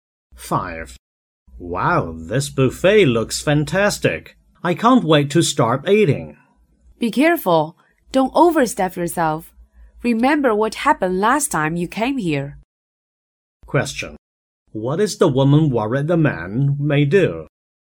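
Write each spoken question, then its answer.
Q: What is the woman worried the man may do?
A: Eat too much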